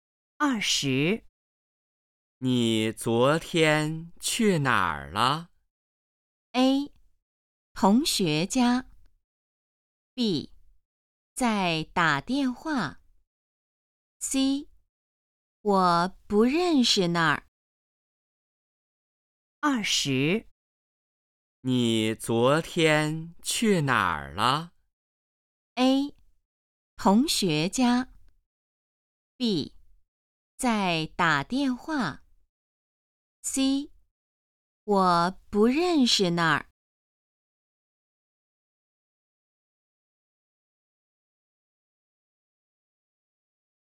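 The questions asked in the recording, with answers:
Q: 你昨天去哪儿了?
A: A: 同学家。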